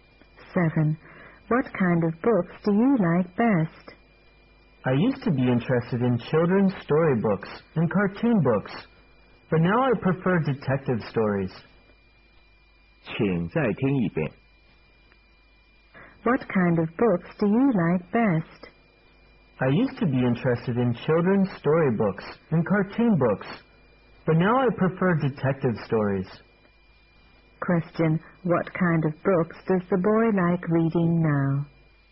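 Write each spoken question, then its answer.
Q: Question, what kind of books does the boy like reading now?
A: Detective stories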